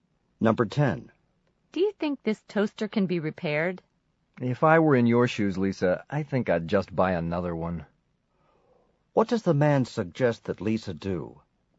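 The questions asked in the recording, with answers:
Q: What does the man suggest that Lisa do?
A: Buy a new toaster.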